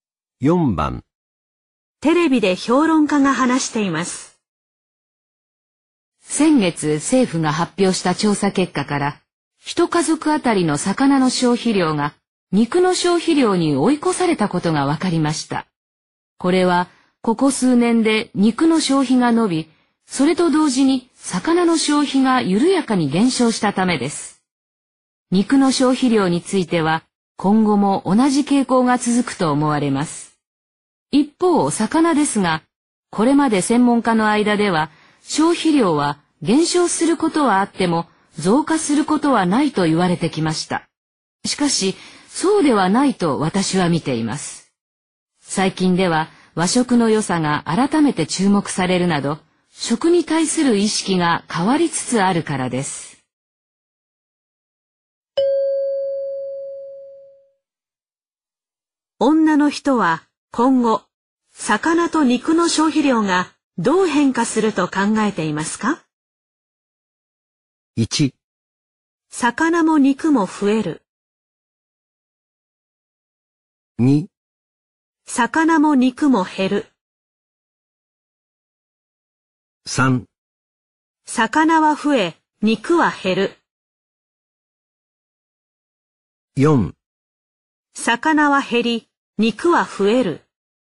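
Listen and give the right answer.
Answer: 1: 魚も肉も増える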